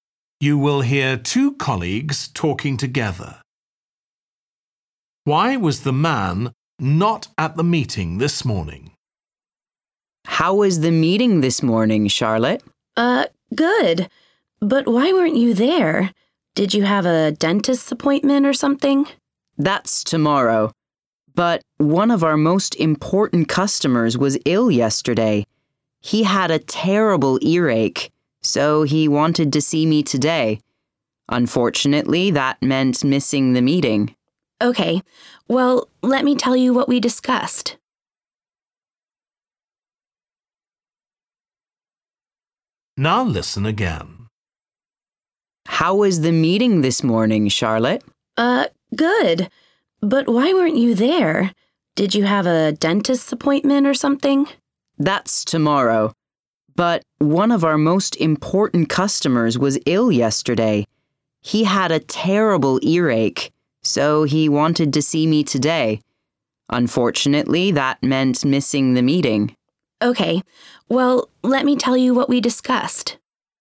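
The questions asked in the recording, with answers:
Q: Why was the man not at the meeting this morning?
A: He had to see an important customer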